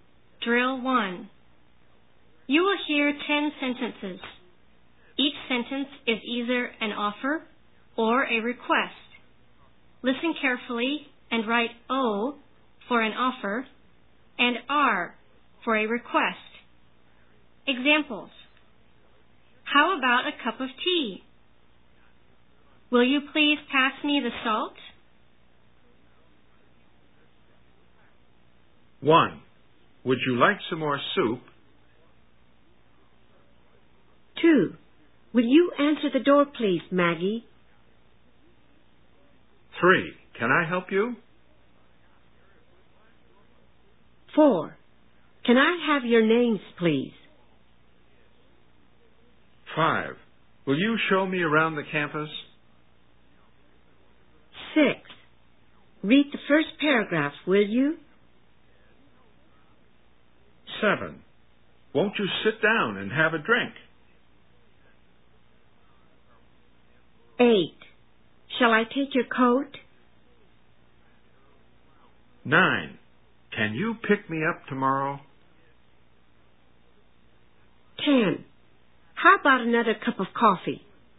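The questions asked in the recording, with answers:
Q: Would you like some more soup?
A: O (offer)

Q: Would you answer the door, please, Maggie?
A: R (request)

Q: Can I help you?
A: O (offer)

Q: Can I have your names, please?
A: R (request)

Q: Will you show me around the campus?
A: R (request)

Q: Read the first paragraph, will you?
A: R (request)

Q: Won't you sit down and have a drink?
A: O (offer)

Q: Shall I take your coat?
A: O (offer)

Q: Can you pick me up tomorrow?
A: R (request)

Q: How about another cup of coffee?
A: O (offer)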